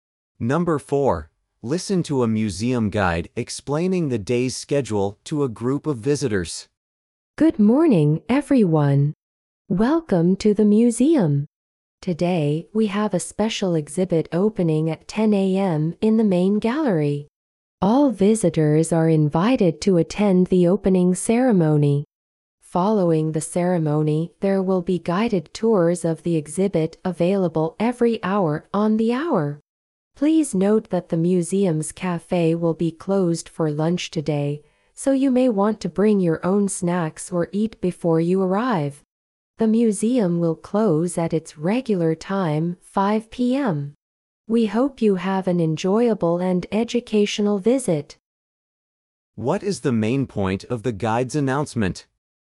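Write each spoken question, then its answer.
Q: What is the main point of the guide's announcement?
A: To explain the day's schedule, including the special exhibit opening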